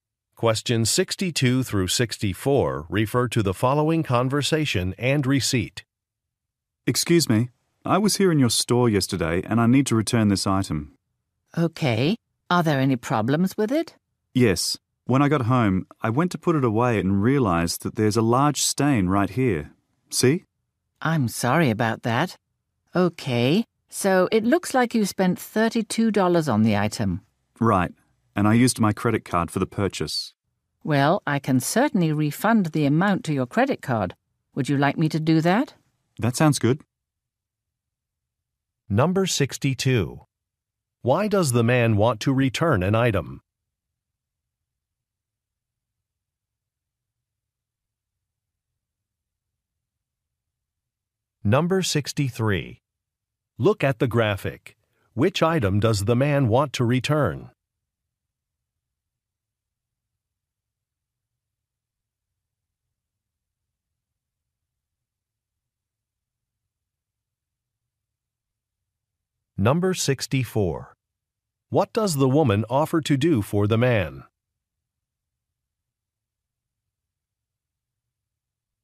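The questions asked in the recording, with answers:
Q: Why does the man want to return an item?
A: It has a large stain

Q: What does the woman offer to do for the man?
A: Refund the amount to his credit card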